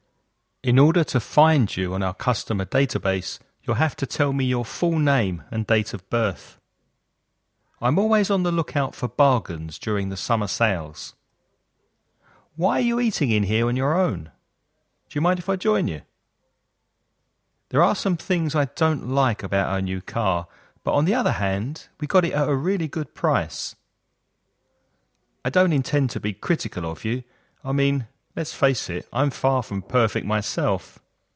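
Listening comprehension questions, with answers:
Write ONE missing word in each gap to complete the sentences. Follow the example.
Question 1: In to find you on our customer database, you'll have to tell me your full name and date of birth.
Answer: order

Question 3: Why are you eating in here on your ? Do you mind if I join you?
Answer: own

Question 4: There are some things I don't like about our new car, but on the other , we got it at a really good price.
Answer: hand

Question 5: I don't intend to be critical of you. I mean, let's face it, I'm from perfect myself.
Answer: far

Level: Avanzado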